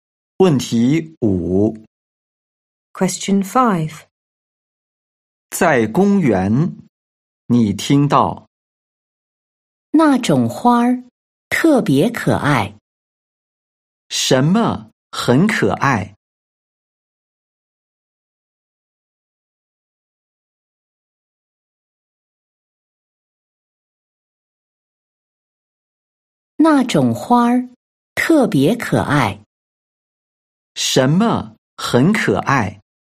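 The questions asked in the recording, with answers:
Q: 什么很可爱?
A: 那种花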